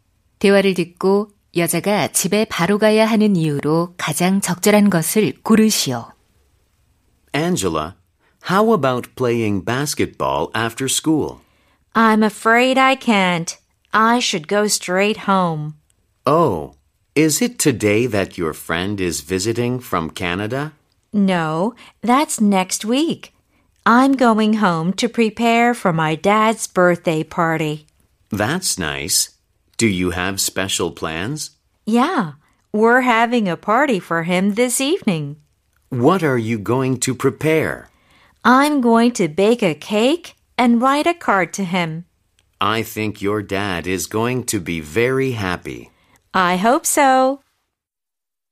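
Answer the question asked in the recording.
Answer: 아빠의 생일 파티를 준비하기 위해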